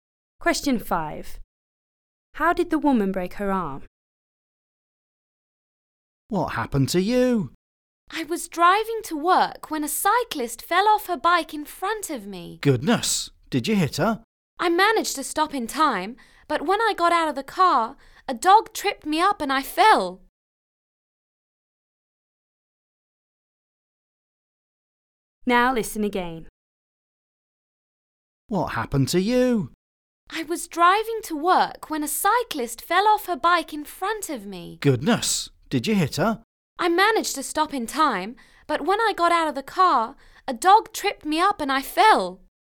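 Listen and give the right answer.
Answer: A dog tripped her up and she fell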